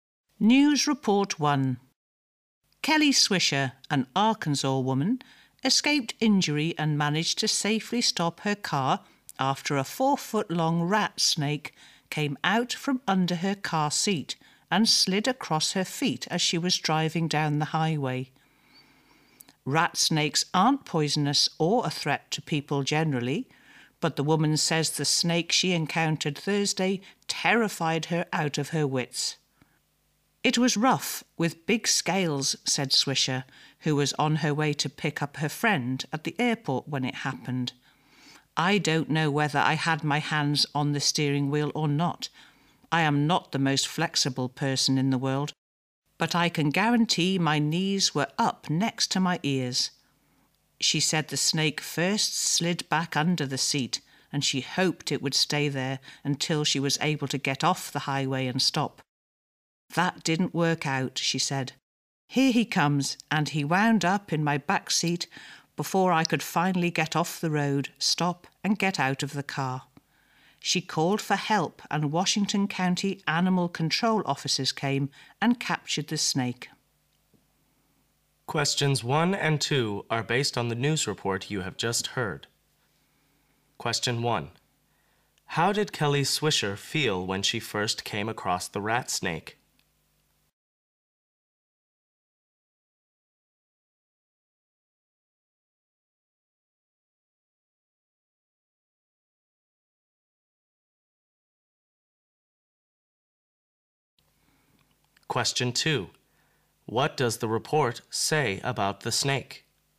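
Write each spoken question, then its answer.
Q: How did Kelly Swisher feel when she first came across the rat snake?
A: Terrified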